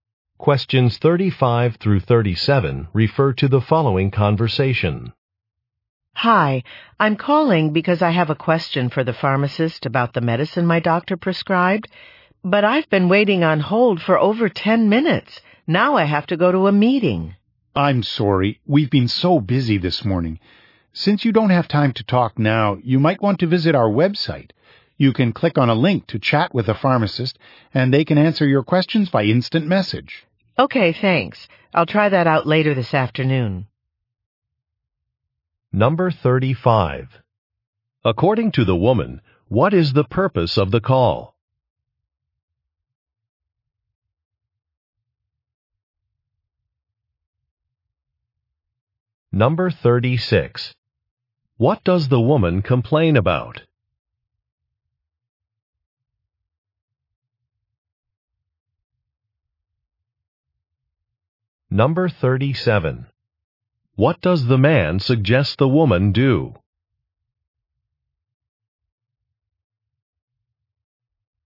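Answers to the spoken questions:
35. To ask the pharmacist about her prescribed medicine
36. She has been on hold for over 10 minutes
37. Visit the website to chat with a pharmacist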